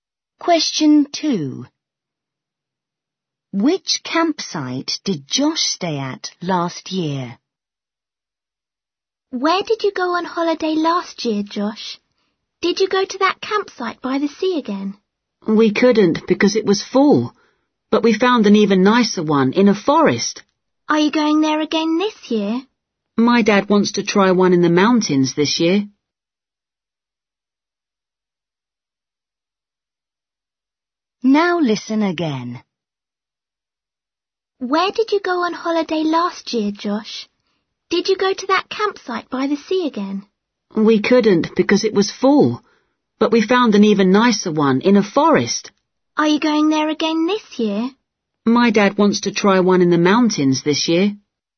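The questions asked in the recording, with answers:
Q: Which campsite did Josh stay at last year?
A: the one in a forest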